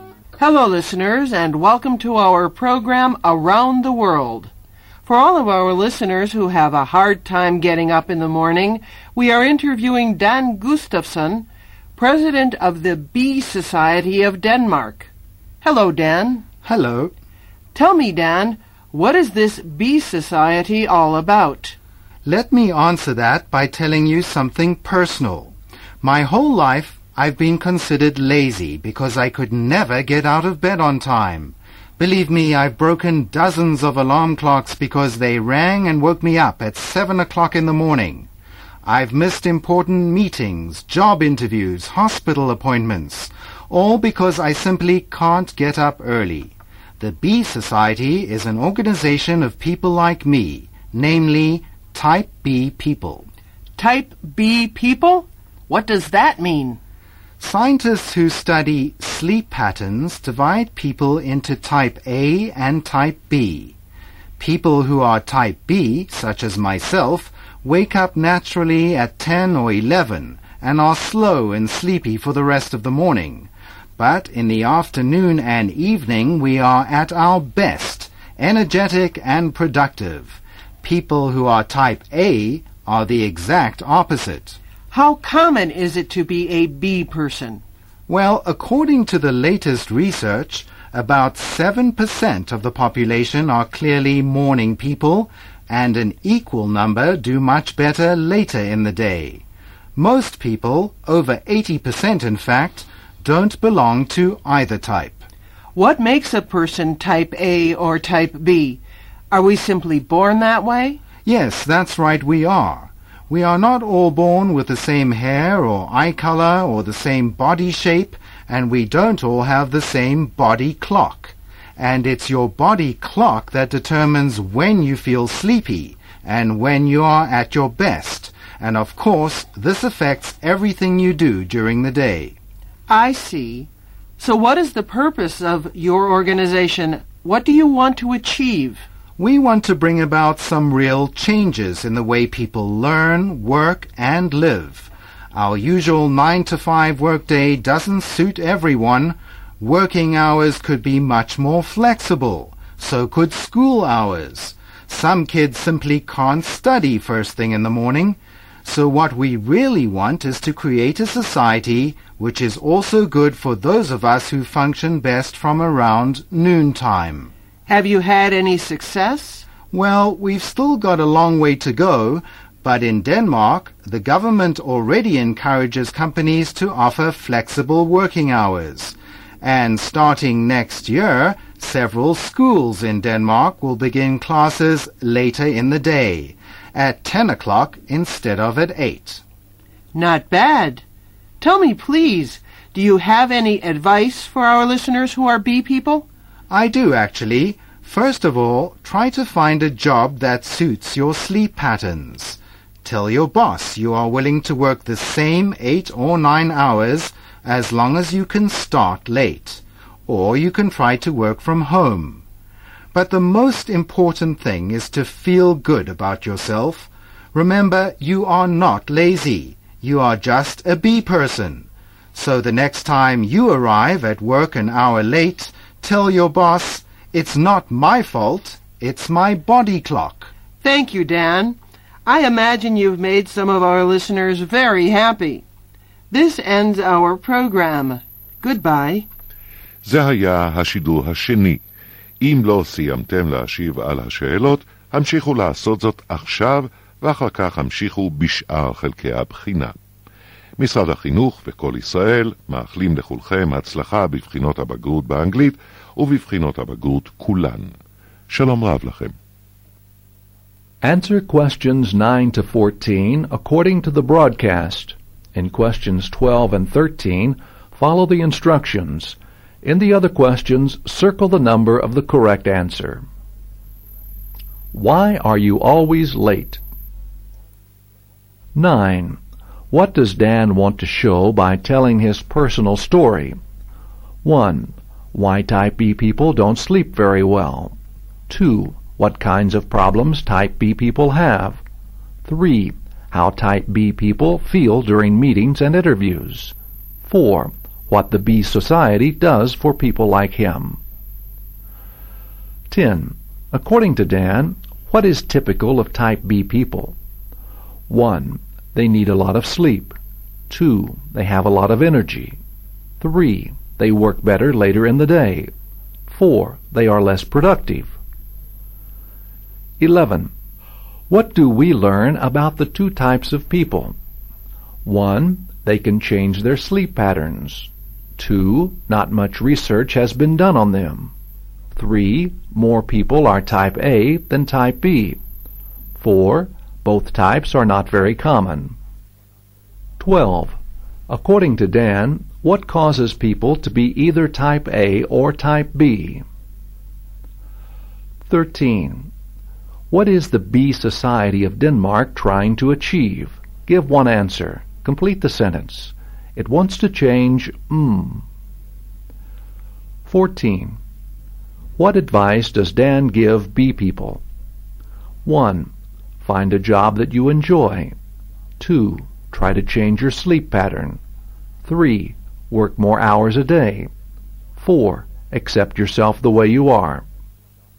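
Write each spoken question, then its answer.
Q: What does Dan want to show by telling his personal story?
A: 2: What kinds of problems type B people have

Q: According to Dan, what is typical of type B people?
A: 3: They work better later in the day.

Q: What do we learn about the two types of people?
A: 4: Both types are not very common.

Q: According to Dan, what causes people to be either type A or type B?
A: Their body clock; they are born that way

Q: What is the Bee Society of Denmark trying to achieve?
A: It wants to change the way people learn, work and live (e.g. more flexible work or school hours)

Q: What advice does Dan give bee people?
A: 4: Accept yourself the way you are.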